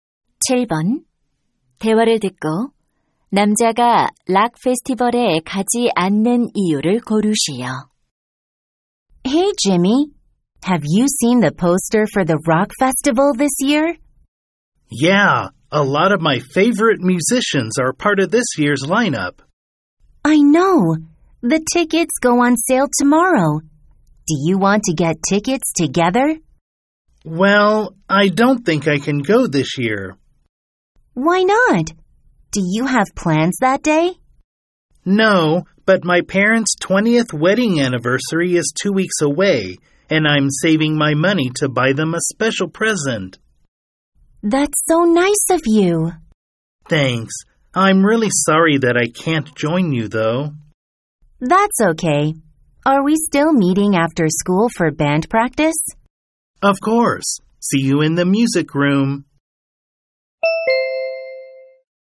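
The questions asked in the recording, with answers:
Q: 대화를 듣고 남자가 락 페스티벌에 가지 않는 이유를 고르시오.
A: 부모님 결혼기념일 선물을 사기 위해 돈을 모으고 있어서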